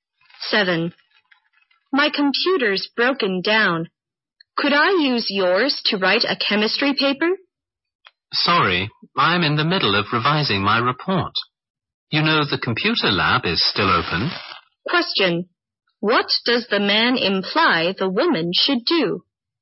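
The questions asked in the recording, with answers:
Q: What does the man imply the woman should do?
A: Use a computer in the computer lab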